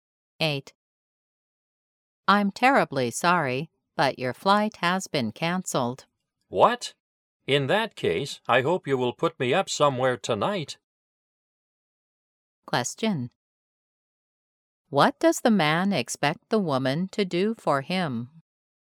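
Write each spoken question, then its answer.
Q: What does the man expect the woman to do for him?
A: Find him a place to stay tonight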